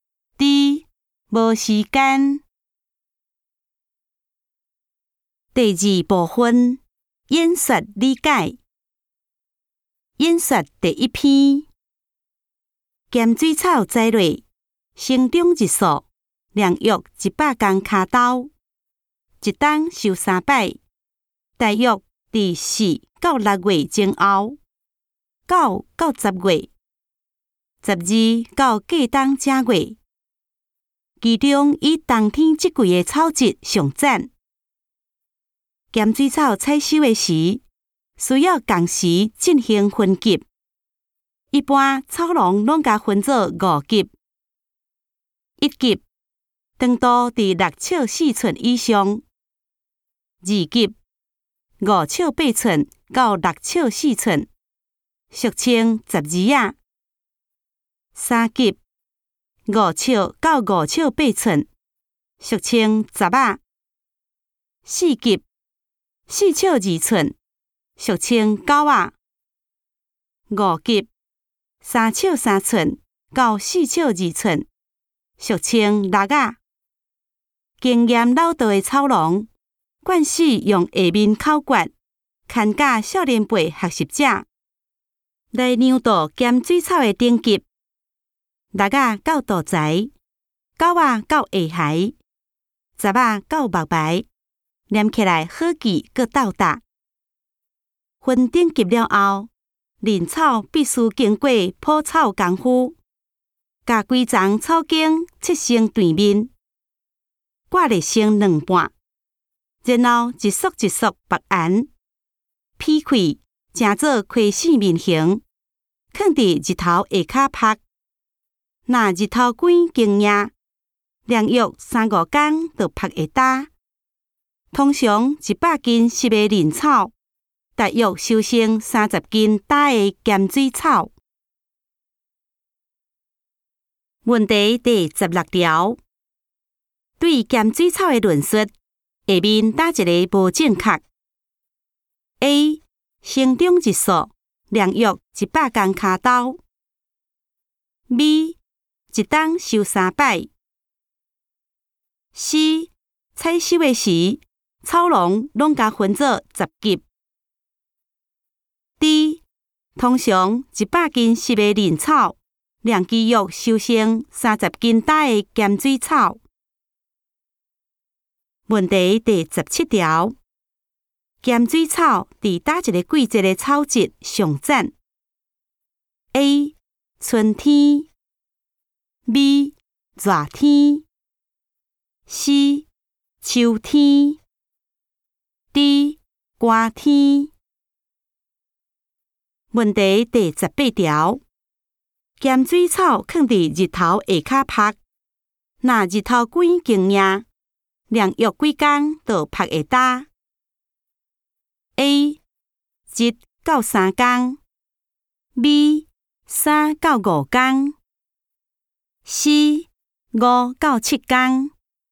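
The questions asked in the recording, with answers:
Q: 对咸水草的论述,下面哪一个无正确 ?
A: C: 采收的时,草农拢甲分作十级。

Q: 咸水草伫哪一个季节的草质上赞 ?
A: D: 寒天

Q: 咸水草放伫日头下骹晒,那日头几经呀?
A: B: 三到五天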